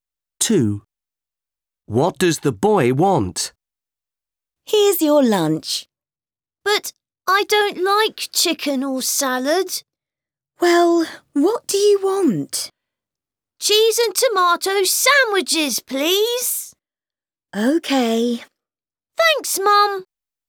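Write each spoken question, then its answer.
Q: What does the boy want?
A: Cheese and tomato sandwiches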